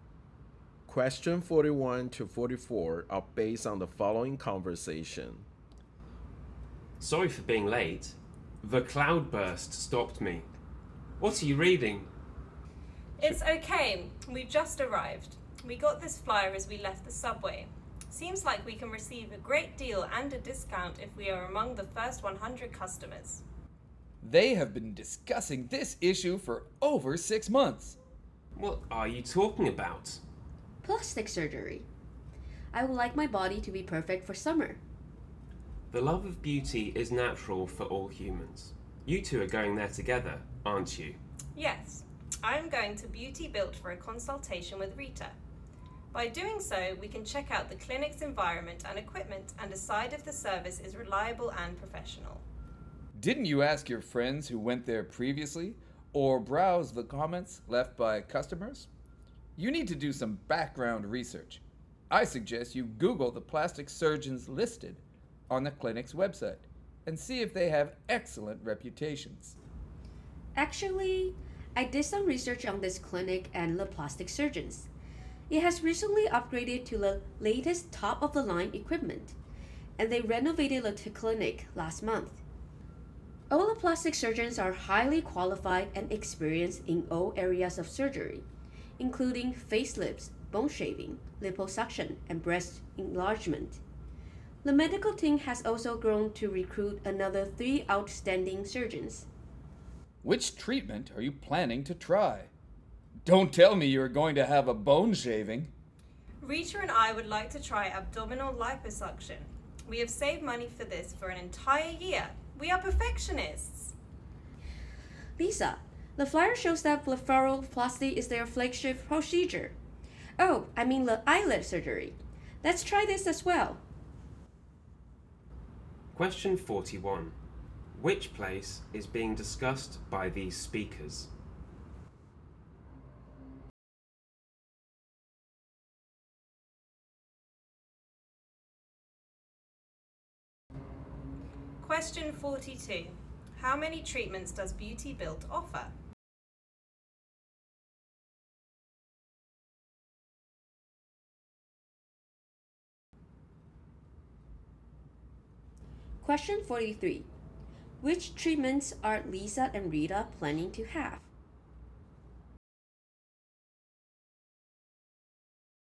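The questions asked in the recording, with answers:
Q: Which place is being discussed by these speakers?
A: A plastic surgery clinic, Beauty Built

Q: Which treatments are Lisa and Rita planning to have?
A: Abdominal liposuction and eyelid surgery (blepharoplasty)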